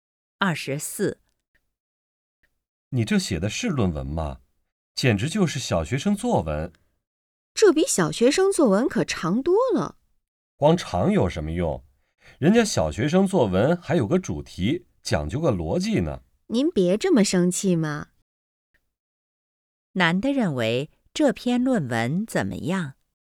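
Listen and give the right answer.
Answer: 没有主题,没有逻辑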